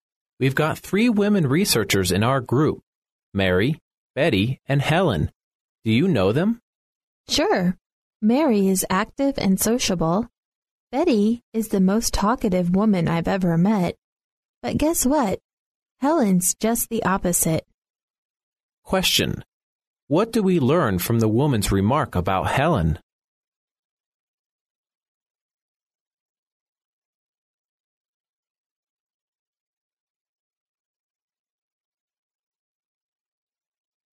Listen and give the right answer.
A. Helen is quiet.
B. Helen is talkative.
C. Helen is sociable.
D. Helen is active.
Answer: A. Helen is quiet.

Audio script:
[听力原文] M: We've got three women researchers in our group: Mary, Betty and Helen. Do you know them? W: Sure. Mary is active and sociable. Betty is the most talkative woman I've ever met. But guess what? Helen's just the opposite. Q: What do we learn from the woman's remark about Helen?